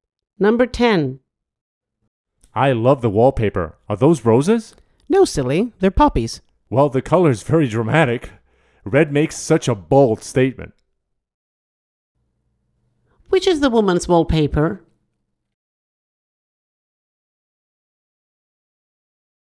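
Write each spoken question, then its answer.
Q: Which is the woman's wallpaper?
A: Red poppies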